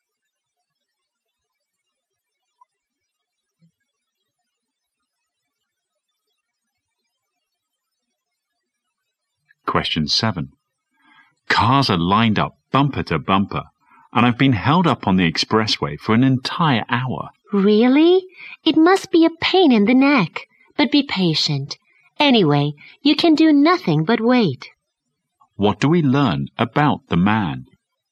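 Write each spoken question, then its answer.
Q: What do we learn about the man?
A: He has been stuck in a traffic jam on the expressway for an hour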